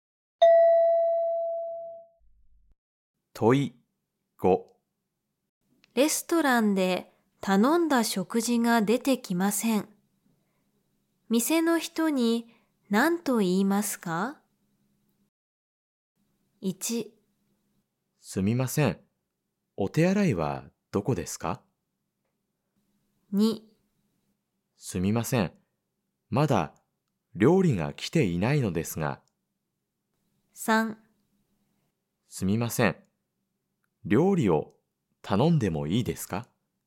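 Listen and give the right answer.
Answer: 2: すみません。まだ料理が来ていないのですが。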